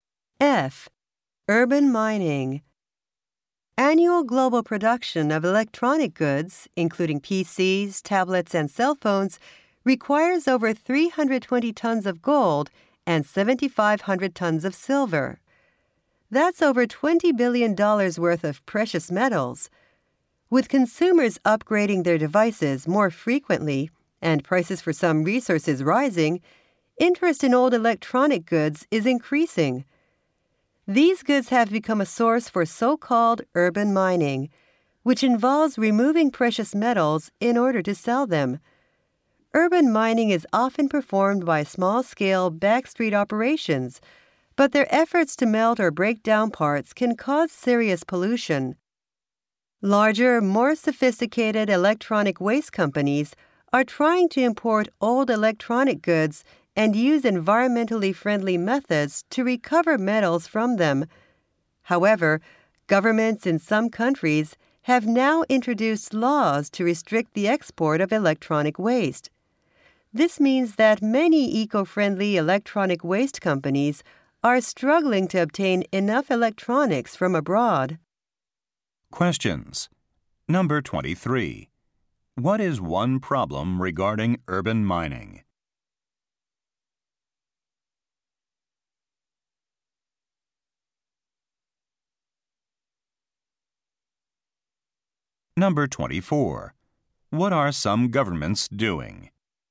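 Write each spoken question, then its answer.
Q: What is one problem regarding urban mining?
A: Small backstreet operations cause pollution

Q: What are some governments doing?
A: Restricting the export of electronic waste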